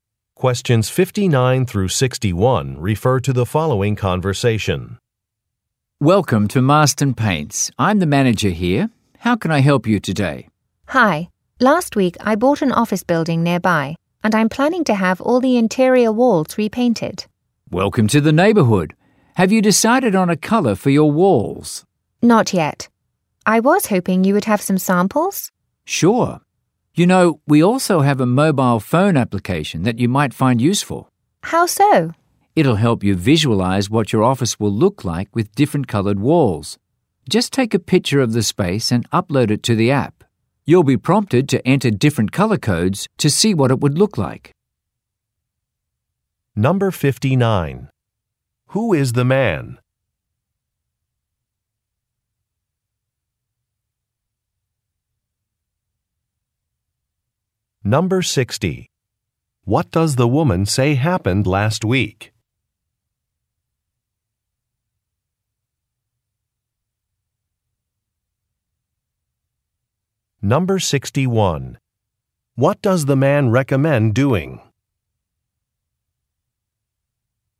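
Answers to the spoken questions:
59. A paint store manager
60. She bought an office building
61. Using a mobile phone app to visualize wall colors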